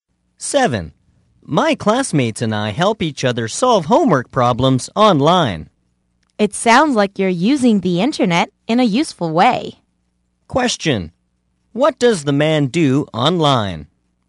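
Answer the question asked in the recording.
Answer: He and his classmates help each other solve homework problems.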